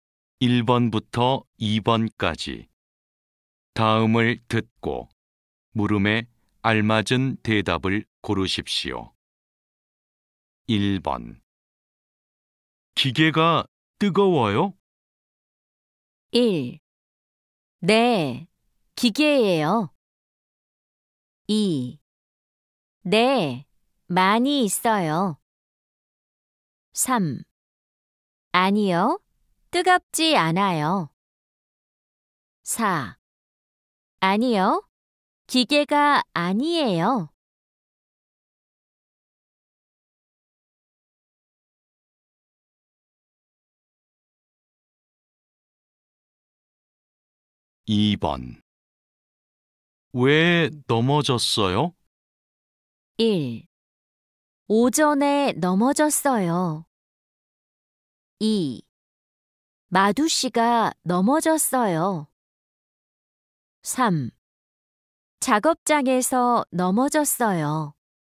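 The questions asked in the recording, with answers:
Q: 기계가 뜨거워요?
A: 3: 아니요, 뜨겁지 않아요.

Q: 왜 넘어졌어요?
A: 4: 바닥이 미끄러워서 넘어졌어요.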